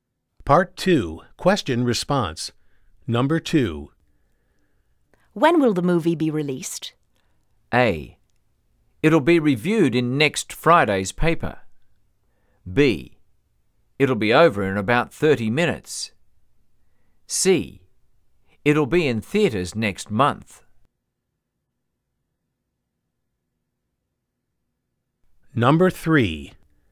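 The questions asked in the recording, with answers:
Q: When will the movie be released?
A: C: It'll be in theaters next month.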